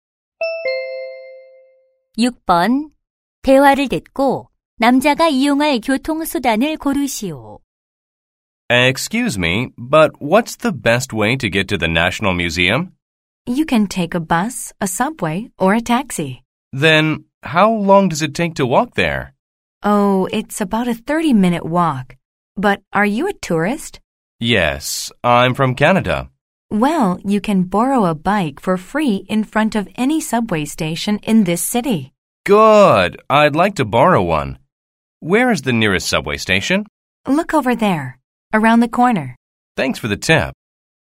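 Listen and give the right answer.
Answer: 자전거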